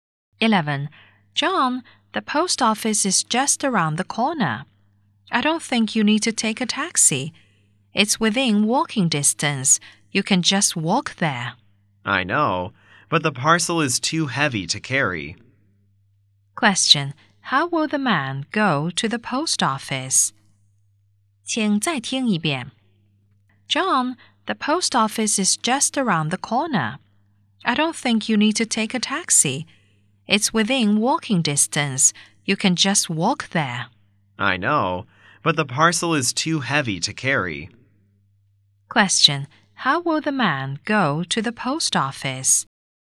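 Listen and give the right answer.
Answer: By taxi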